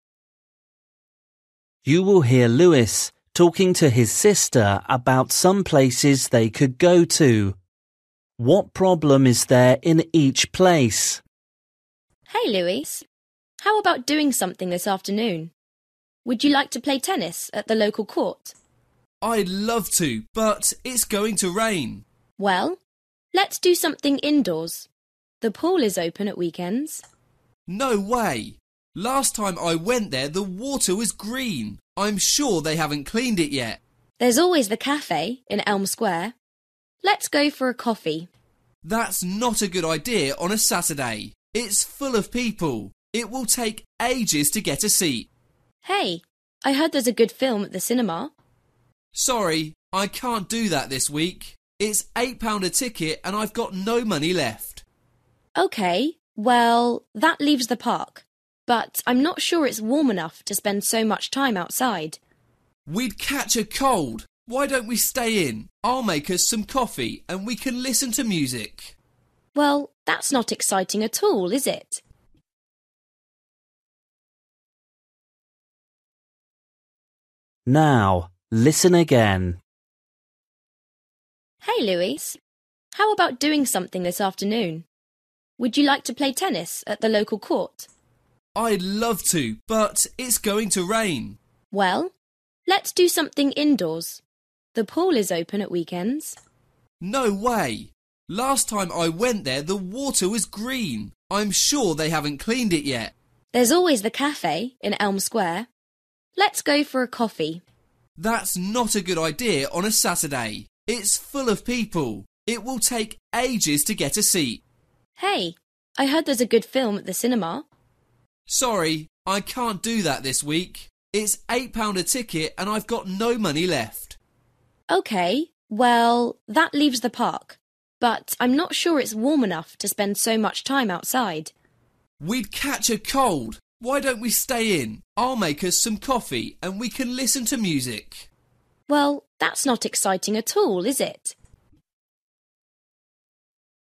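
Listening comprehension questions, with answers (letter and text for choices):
For each question, choose the correct answer.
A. wet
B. noisy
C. cold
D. dirty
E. busy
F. warm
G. expensive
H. boring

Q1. swimming pool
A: D. dirty

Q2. cafe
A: E. busy

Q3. cinema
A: G. expensive

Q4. park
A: C. cold

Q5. home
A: H. boring

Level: Luyện nghe trình độ A2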